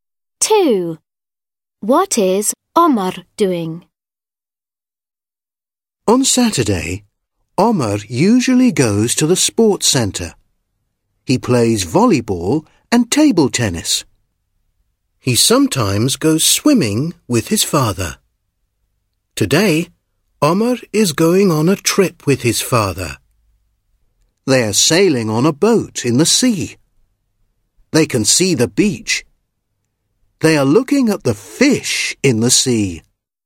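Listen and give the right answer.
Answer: Sailing on a boat in the sea with his father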